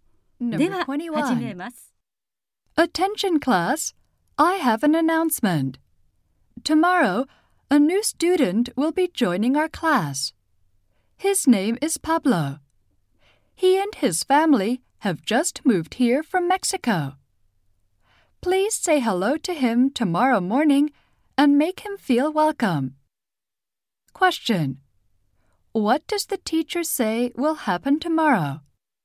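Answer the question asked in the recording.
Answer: A new student will join the class.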